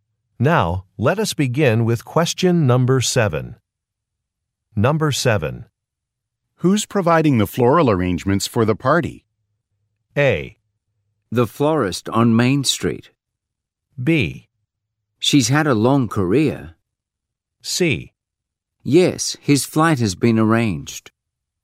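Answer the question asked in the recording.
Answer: A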